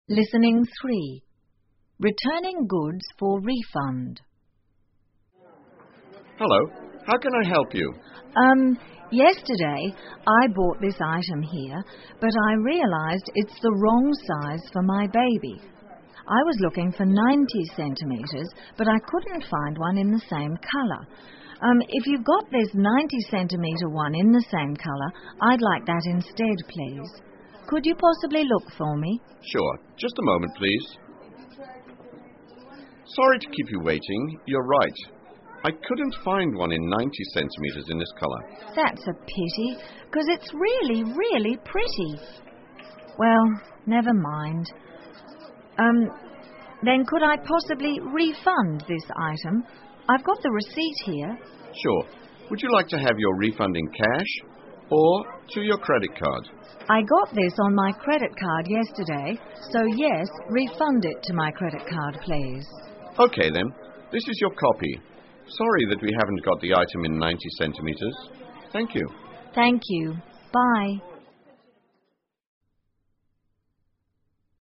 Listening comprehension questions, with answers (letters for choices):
请根据对话内容,选出一个正确的答案。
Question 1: Where is this conversation being held?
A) At a baby clothes shop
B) At a paint shop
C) At a bank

请根据对话内容,判断下面句子是否正确,如果符合对话内容,请在T做记号,如果不符合,请在F做记号。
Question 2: The customer bought a clothes sized 90cm for her baby yesterday.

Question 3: The item the customer wanted was there but in a different colour.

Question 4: The customer wanted the refund in cash.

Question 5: The customer showed the receipt to the shop assistant.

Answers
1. A
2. F
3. F
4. F
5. T